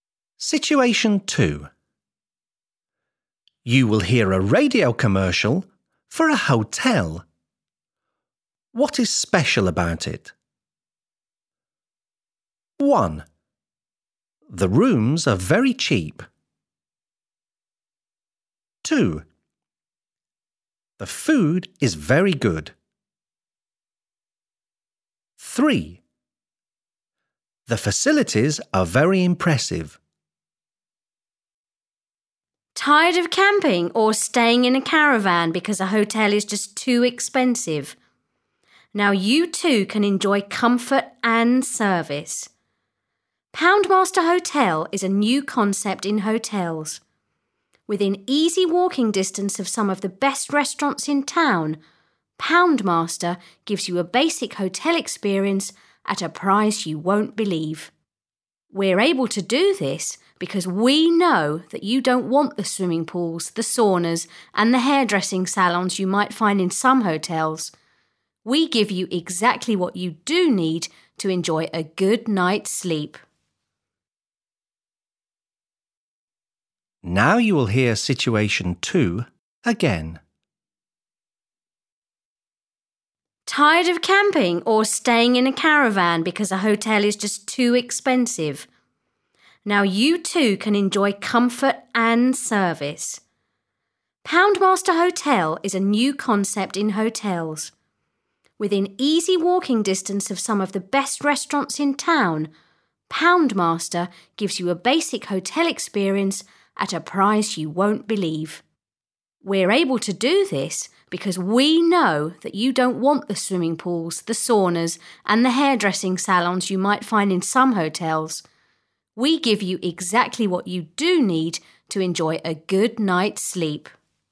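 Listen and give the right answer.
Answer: 1: The rooms are very cheap.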